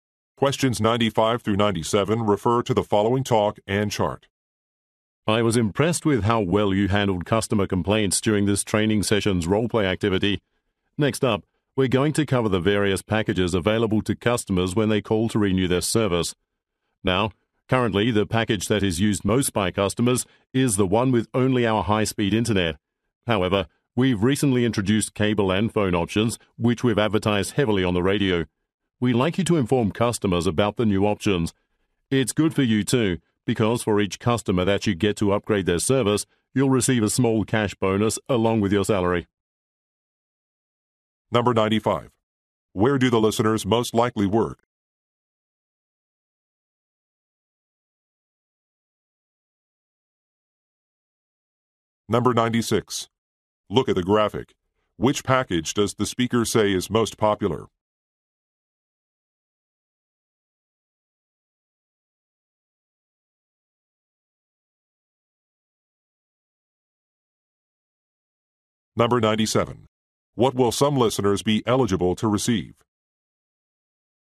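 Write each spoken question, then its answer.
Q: Where do the listeners most likely work?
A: At an internet/cable service provider's customer service center

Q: What will some listeners be eligible to receive?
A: A small cash bonus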